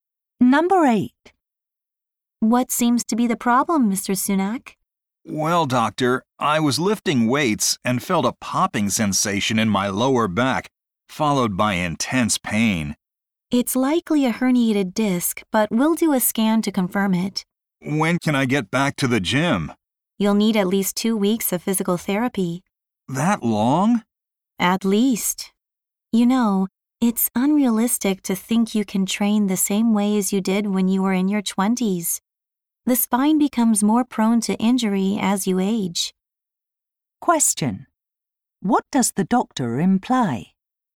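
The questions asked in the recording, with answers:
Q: What does the doctor imply?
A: Mr. Sunak should change how he trains because he is older and more prone to injury.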